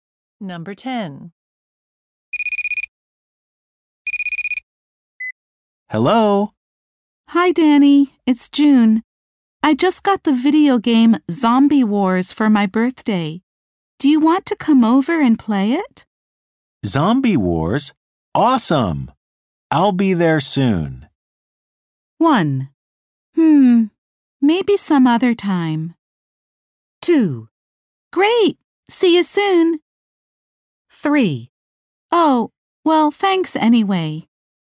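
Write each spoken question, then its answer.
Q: Zombie Wars? Awesome. I'll be there soon.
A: 2: Great. See you soon.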